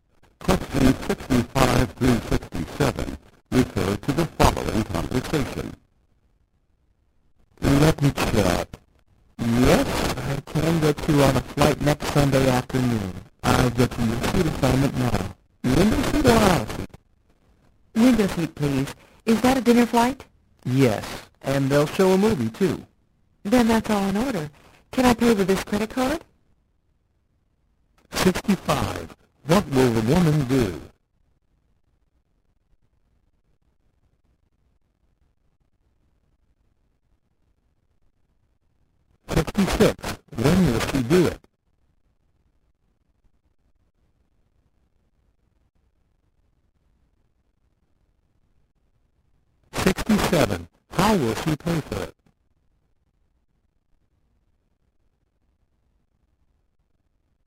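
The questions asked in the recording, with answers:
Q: What will the woman do?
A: Take a flight

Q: When will she do it?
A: Next Sunday afternoon

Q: How will she pay for it?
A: With a credit card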